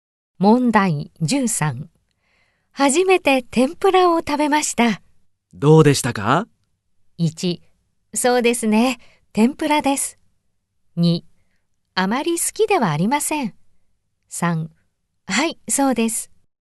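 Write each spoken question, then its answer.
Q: 初めて天ぷらを食べました。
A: 2: あまり好きではありません。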